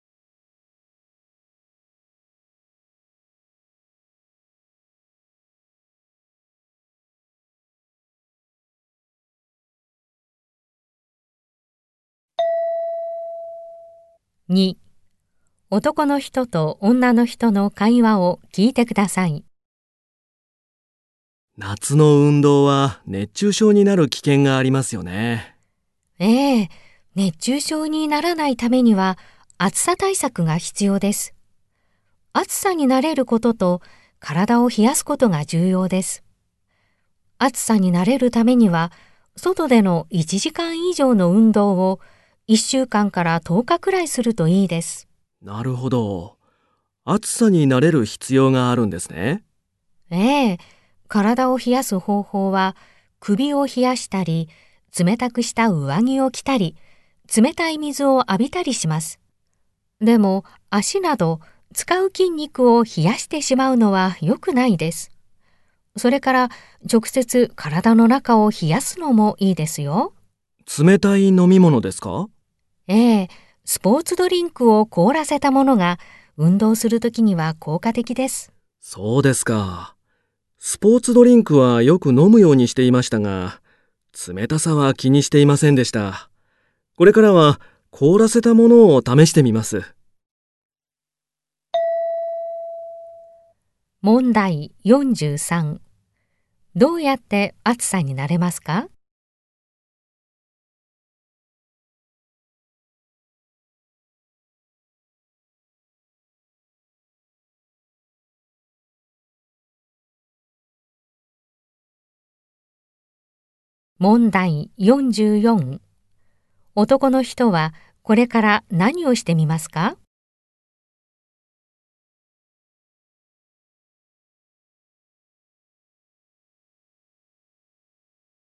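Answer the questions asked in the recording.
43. 外で1時間以上の運動を1週間から10日くらいする
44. 凍らせたスポーツドリンクを試す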